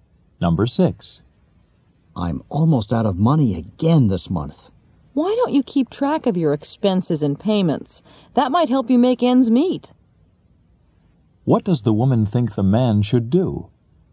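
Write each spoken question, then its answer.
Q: What does the woman think the man should do?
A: Keep track of his expenses and payments.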